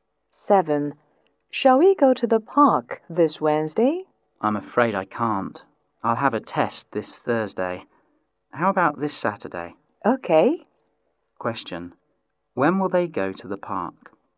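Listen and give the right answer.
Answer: This Saturday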